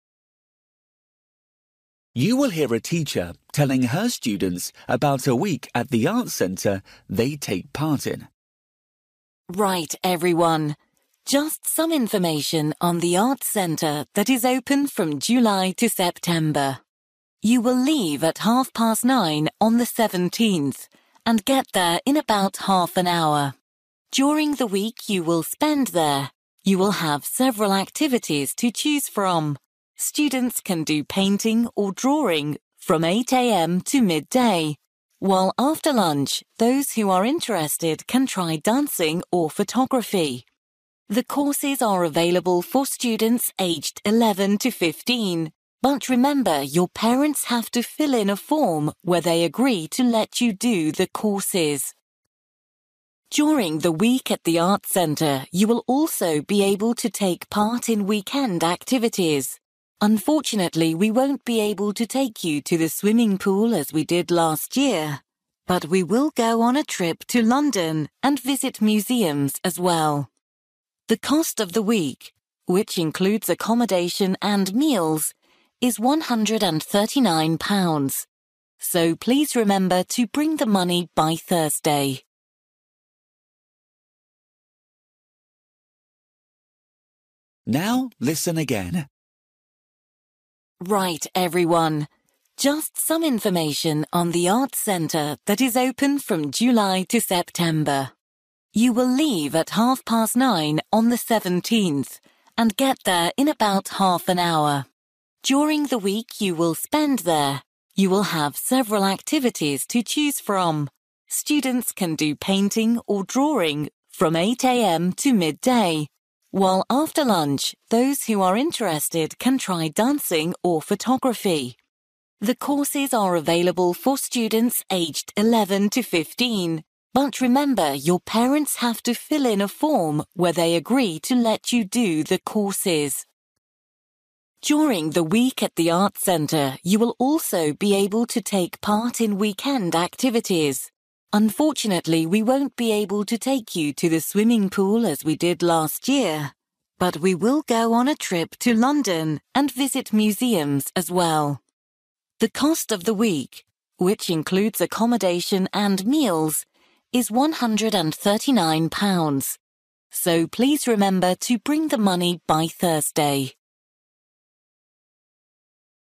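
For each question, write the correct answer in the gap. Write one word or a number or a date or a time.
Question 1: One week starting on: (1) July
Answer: 17th

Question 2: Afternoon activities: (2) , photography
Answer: dancing

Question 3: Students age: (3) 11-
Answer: 15

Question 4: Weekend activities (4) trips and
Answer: museums

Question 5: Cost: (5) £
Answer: 139

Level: Luyện nghe trình độ A2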